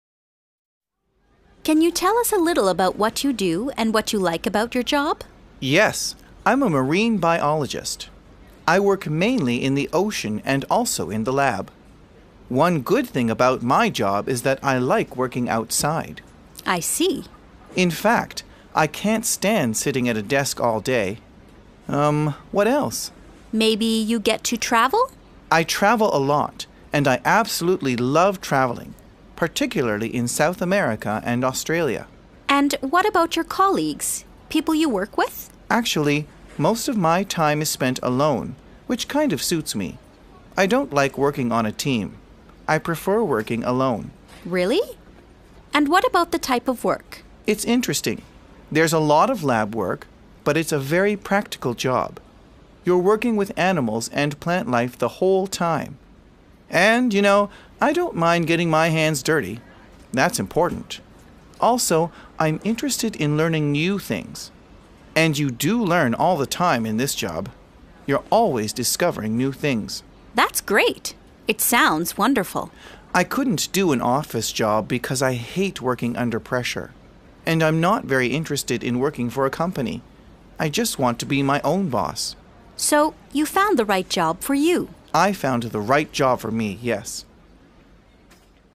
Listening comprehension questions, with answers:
B. Listen again and complete the sentences.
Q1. I like ............... outside.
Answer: working

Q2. I can't stand ............... at a desk all day.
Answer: sitting

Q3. I absolutely love ............... .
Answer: traveling

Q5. I don't mind ............... my hands dirty.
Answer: getting

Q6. I like ............... new things.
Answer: learning

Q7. I hate ............... under pressure.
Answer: working

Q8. I don't really like ............... for a company. I want to be my own boss.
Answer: working

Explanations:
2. In fact, I can't stand sitting at a desk all day.
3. I travel a lot, and I absolutely love traveling, particularly in South America and Australia.

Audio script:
I: Can you tell us a little about what you do and what you like about your job?
M: Yes. I'm a marine biologist. I work mainly in the ocean and also in the lab. One good thing about my job is that I like working outside.
I: I see.
M: In fact, I can't stand sitting at a desk all day. Um. What else?
I: Maybe you get to travel ...
M: I travel a lot, and I absolutely love traveling, particularly in South America and Australia.
I: And what about your colleagues, people you work with?
M: Actually, most of my time is spent alone, which kind of suits me. I don't like working on a team. I prefer working alone.
I: Really? And what about the type of work?
M: It's interesting—there's a lot of lab work, but it's a very practical job. You're working with animals and plant life the whole time. And, y'know, I don't mind getting my hands dirty. That's important. Also, I'm interested in learning new things —and you do learn all the time in this job. You're always discovering new things.
I: That's great. It sounds wonderful.
M: I couldn't do an office job because I hate working under pressure. And I'm not very interested in working for a company. I just want to be my own boss.
I: So, you found the right job for you.
M: I found the right job for me, yes.